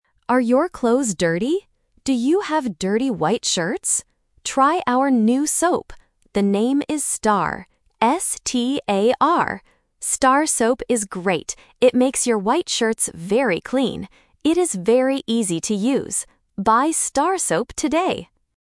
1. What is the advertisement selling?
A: A new soap

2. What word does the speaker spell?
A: S-T-A-R

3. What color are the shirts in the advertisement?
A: White

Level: A1